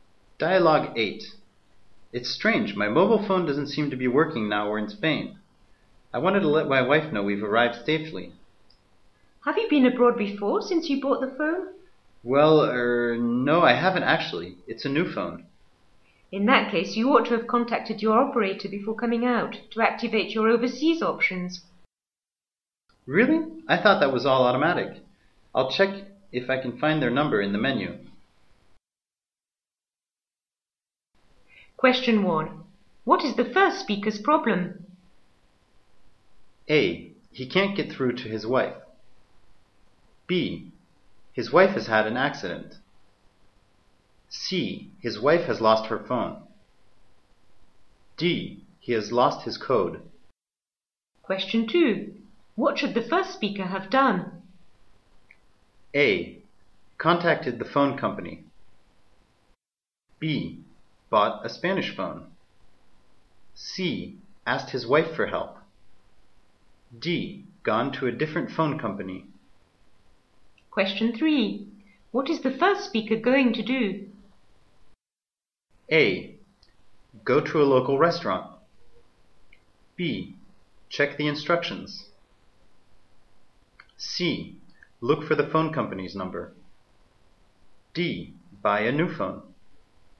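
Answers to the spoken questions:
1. A: He can't get through to his wife.
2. A: Contacted the phone company.
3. C: Look for the phone company's number.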